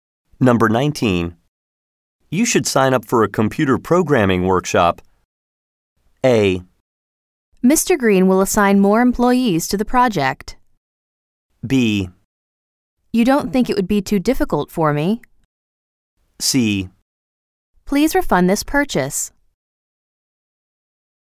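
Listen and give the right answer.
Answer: B: You don't think it would be too difficult for me?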